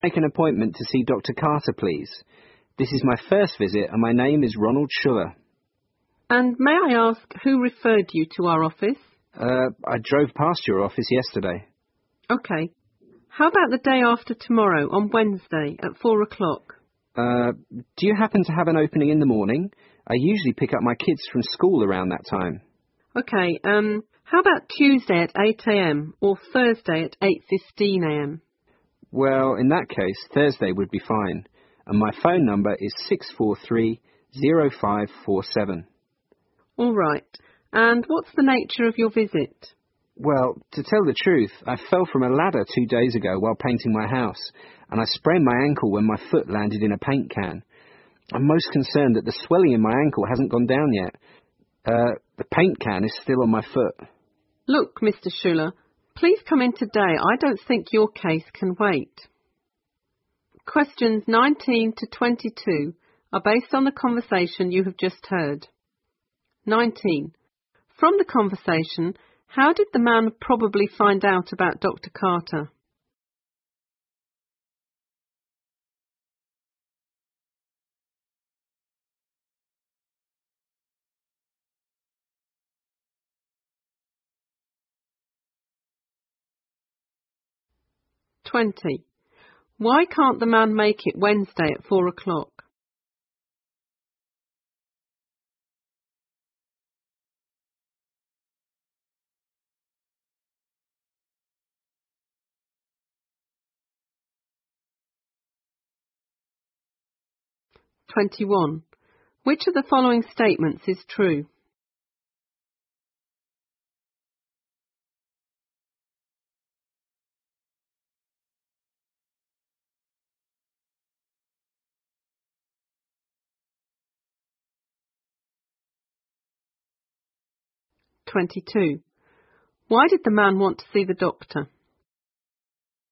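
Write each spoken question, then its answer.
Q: From the conversation, how did the man probably find out about Dr. Carter?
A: He drove past the doctor's office.

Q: Why can't the man make it Wednesday at 4 o'clock?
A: He usually picks up his kids from school then.

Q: Why did the man want to see the doctor?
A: He sprained his ankle falling from a ladder.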